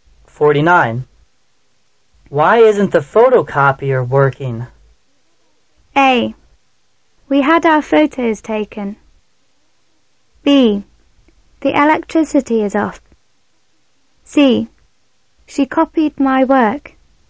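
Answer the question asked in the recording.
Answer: B: The electricity is off.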